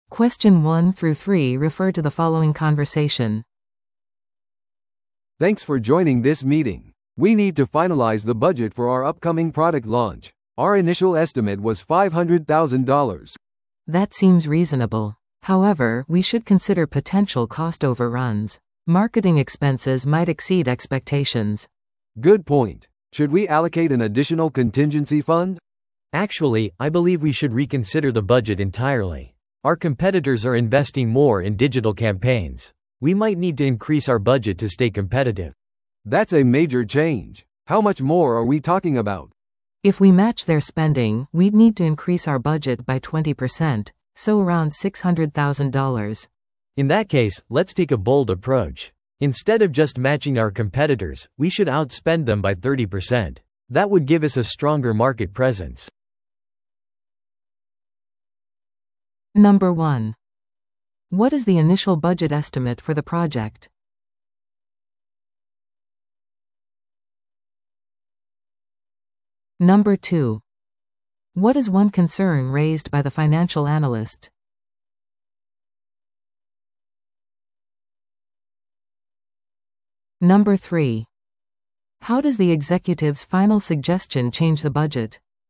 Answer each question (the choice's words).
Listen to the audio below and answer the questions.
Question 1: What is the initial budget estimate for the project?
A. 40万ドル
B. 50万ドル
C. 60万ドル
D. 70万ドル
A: 50万ドル

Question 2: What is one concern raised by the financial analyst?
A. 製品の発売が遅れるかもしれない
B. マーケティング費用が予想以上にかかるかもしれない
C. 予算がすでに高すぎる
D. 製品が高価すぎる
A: マーケティング費用が予想以上にかかるかもしれない

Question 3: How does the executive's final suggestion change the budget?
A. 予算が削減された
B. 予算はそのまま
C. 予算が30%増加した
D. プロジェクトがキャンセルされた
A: 予算が30%増加した

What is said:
A: "Thanks for joining this meeting. We need to finalize the budget for our upcoming product launch. Our initial estimate was $500,000."
B: "That seems reasonable. However, we should consider potential cost overruns. Marketing expenses might exceed expectations."
A: "Good point. Should we allocate an additional contingency fund?"
C: "Actually, I believe we should reconsider the budget entirely. Our competitors are investing more in digital campaigns. We might need to increase our budget to stay competitive."
A: "That's a major change. How much more are we talking about?"
B: "If we match their spending, we'd need to increase our budget by 20%—so around $600,000."
C: "In that case, let's take a bold approach. Instead of just matching our competitors, we should outspend them by 30%. That would give us a stronger market presence."